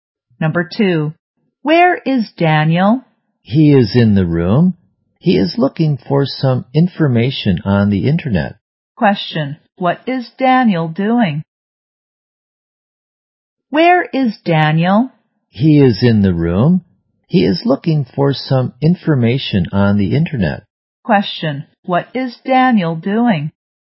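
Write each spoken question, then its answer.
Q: what is Daniel doing?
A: Looking for information on the internet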